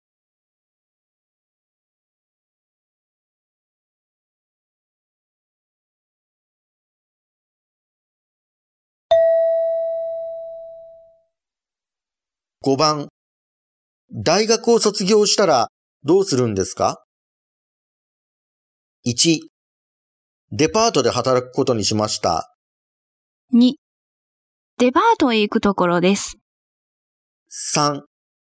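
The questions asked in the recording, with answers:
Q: 大学を卒業したらどうするんですか?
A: 1: デパートで働くことにしました。

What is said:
2
じゃあ、こちらを使ってください。
3
ちょっと安いですよ。
1
デパートで働くことにしました。
2
デパートへ行くところです。
3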